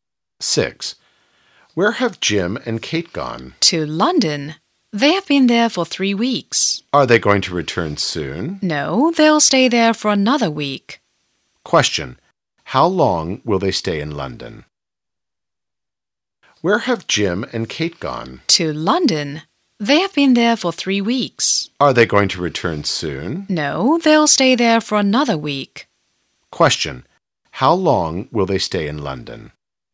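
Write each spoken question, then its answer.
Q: How long will they stay in London?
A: Another week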